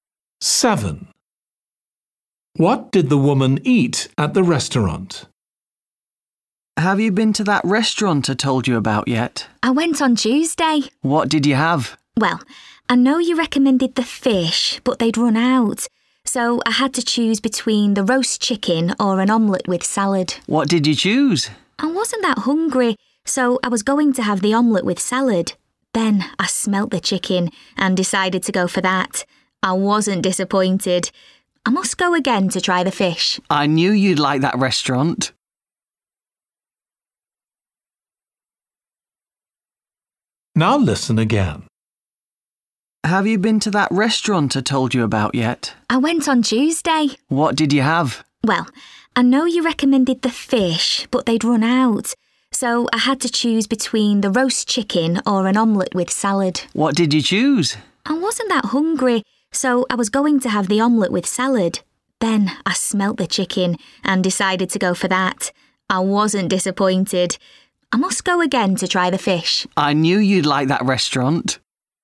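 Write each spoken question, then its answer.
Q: What did the woman eat at the restaurant?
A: Roast chicken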